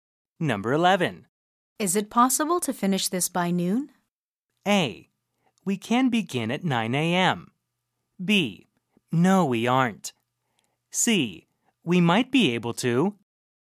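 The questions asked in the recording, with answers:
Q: Is it possible to finish this by noon?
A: C: We might be able to.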